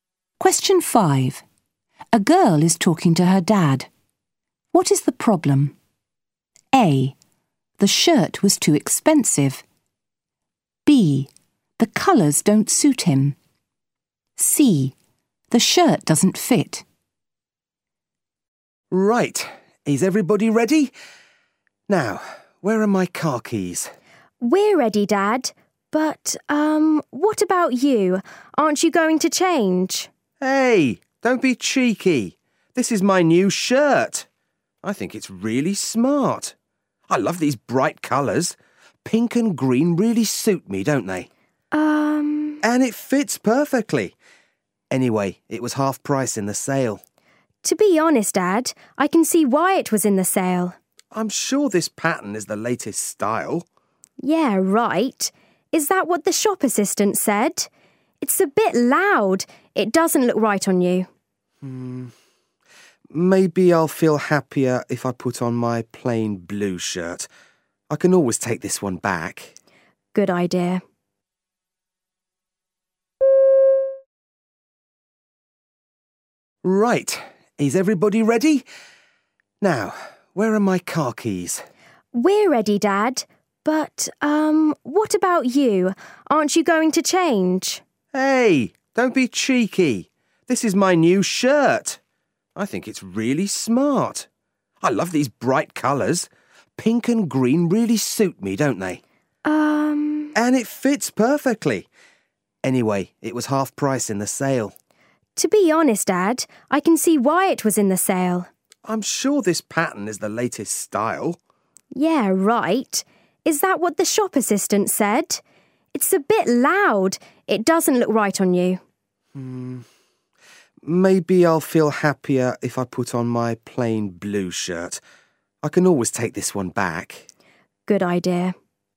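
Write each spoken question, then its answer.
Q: What is the problem?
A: B: The colours don't suit him.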